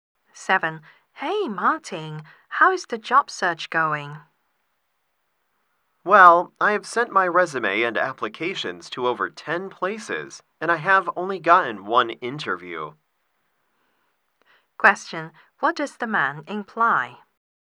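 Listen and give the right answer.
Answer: His job search is not going well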